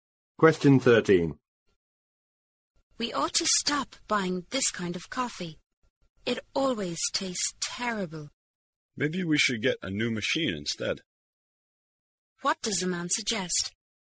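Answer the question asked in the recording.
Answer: Getting a new coffee machine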